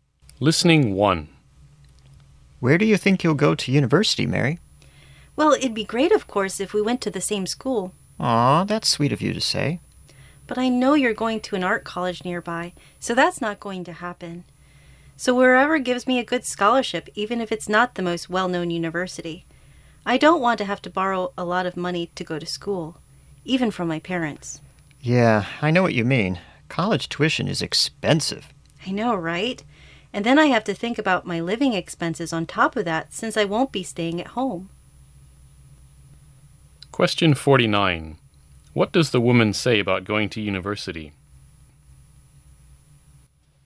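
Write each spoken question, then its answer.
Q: What does the woman say about going to university?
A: She wants to go wherever gives her a good scholarship so she doesn't have to borrow a lot of money.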